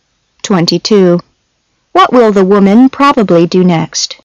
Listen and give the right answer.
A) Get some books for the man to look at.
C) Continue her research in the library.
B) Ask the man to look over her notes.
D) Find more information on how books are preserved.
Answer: C) Continue her research in the library.